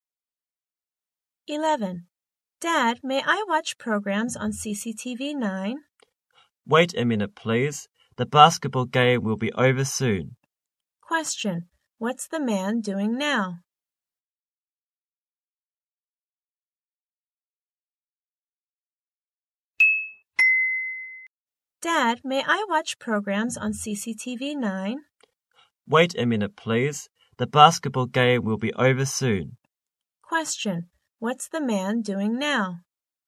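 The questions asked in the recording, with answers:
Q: What's the man doing now?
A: Watching a basketball game on TV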